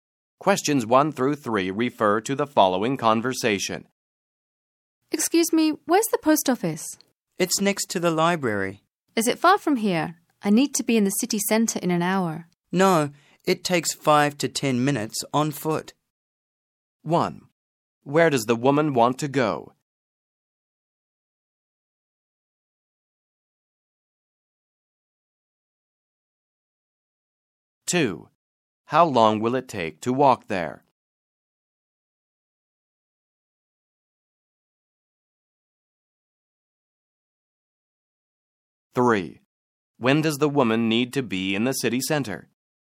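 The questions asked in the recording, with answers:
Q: Where does the woman want to go?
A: The post office

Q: How long will it take to walk there?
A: 5 to 10 minutes

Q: When does the woman need to be in the city center?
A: In an hour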